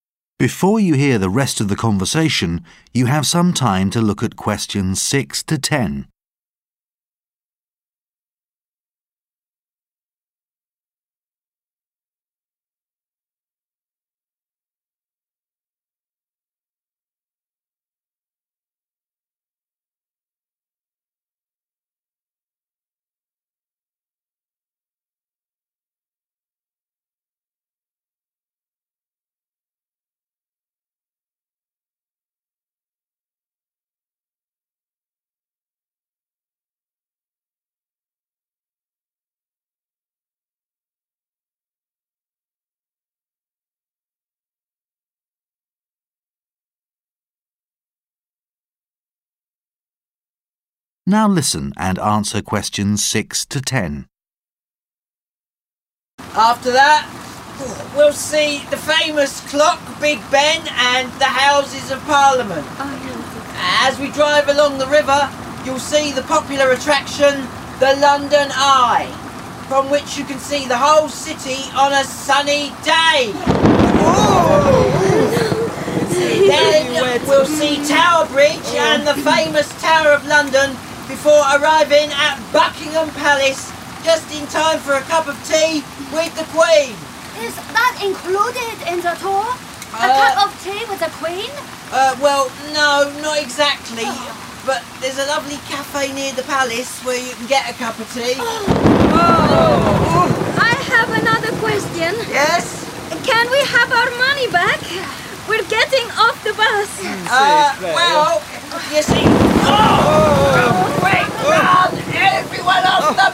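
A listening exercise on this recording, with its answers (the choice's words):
Questions 6-10 Choose the correct letter, A, B, C or D.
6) Which landmark can tourists expect to see before arriving at Buckingham Palace?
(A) Sherlock Holmes Museum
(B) Tower Bridge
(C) Big Ben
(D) The Houses of Parliament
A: Tower Bridge

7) What does the tourist inquire about regarding the tour?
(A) The inclusion of a visit to Tower Bridge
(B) The availability of a guided tour of Buckingham Palace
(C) The possibility of having a cup of tea with the Queen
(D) The schedule for visiting the Tower of London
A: The possibility of having a cup of tea with the Queen

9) What does the tourist inquire about?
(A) The possibility of a refund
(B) The tour guide's name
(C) The next stop on the tour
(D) The schedule for the day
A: The possibility of a refund

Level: THCS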